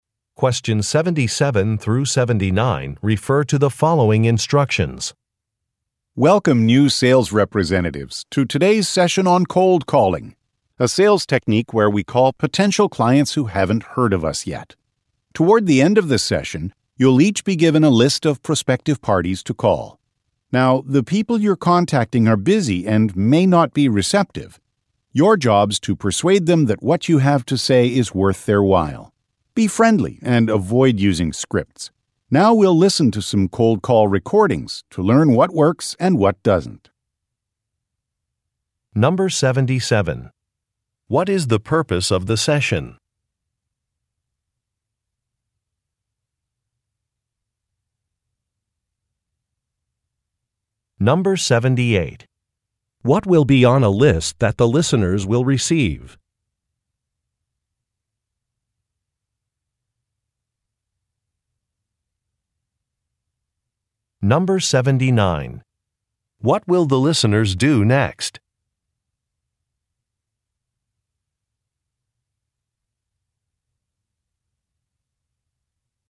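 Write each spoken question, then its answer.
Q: What is the purpose of the session?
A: To train new sales representatives in cold calling

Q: What will be on a list that the listeners will receive?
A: Prospective clients to call

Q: What will the listeners do next?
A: Listen to some cold call recordings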